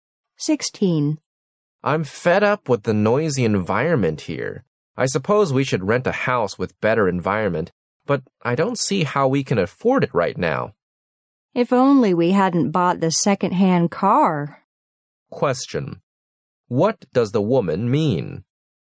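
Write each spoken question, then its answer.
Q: What does the woman mean?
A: She regrets buying the second-hand car, so they can't afford a better house.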